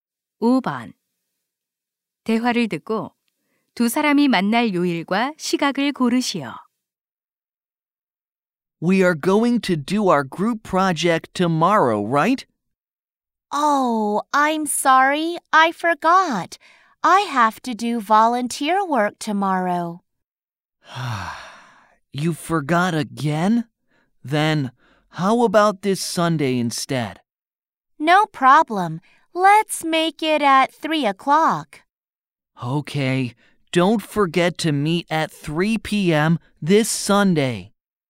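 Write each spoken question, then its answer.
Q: 대화를 듣고 두 사람이 만날 요일과 시각을 고르시오.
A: 일요일 오후 3시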